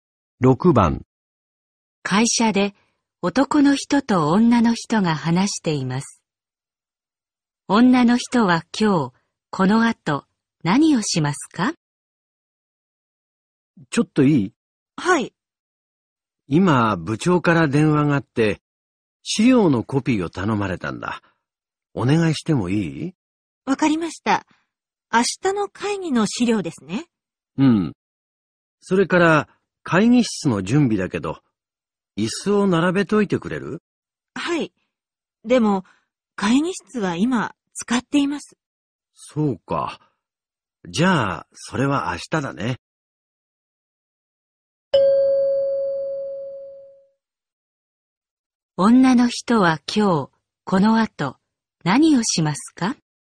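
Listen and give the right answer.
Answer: 資料のコピー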